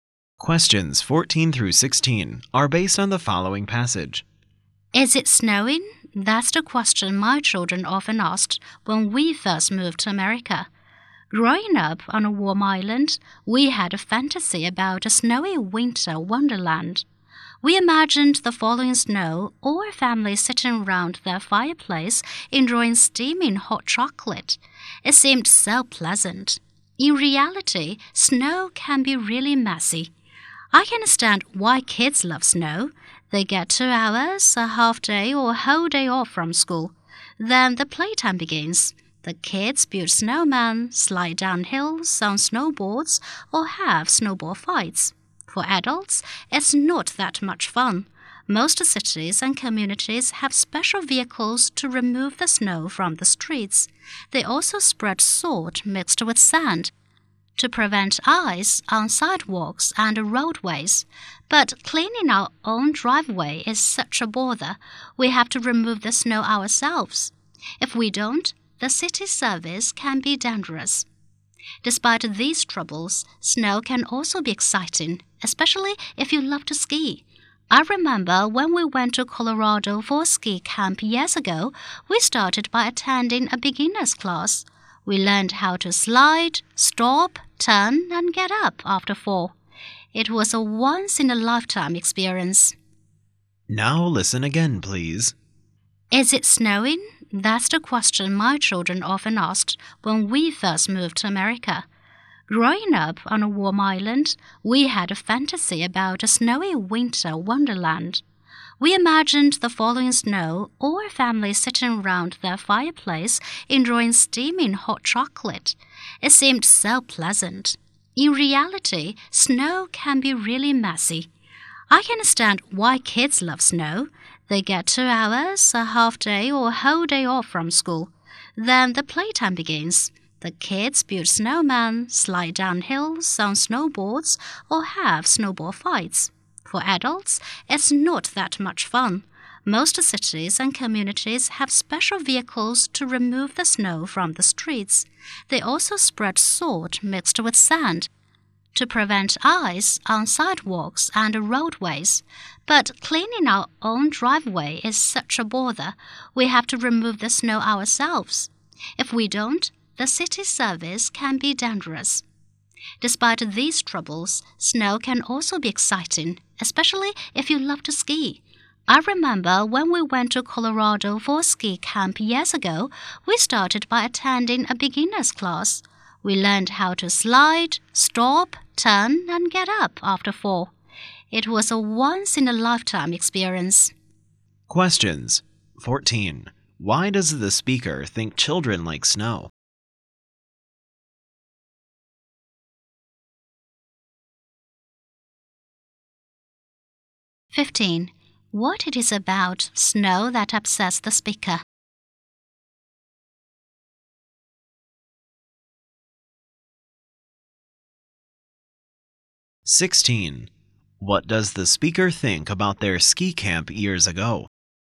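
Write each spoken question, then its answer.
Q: Why does the speaker think children like snow?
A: They get time off school to play.

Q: What it is about snow that upsets the speaker?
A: Having to clear their own driveway.

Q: What does the speaker think about their ski camp years ago?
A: It was a once-in-a-lifetime experience.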